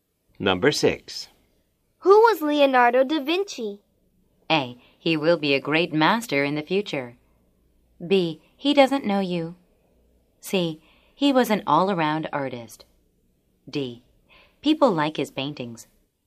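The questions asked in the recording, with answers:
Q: Who was Leonardo da Vinci?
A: C: He was an all-around artist.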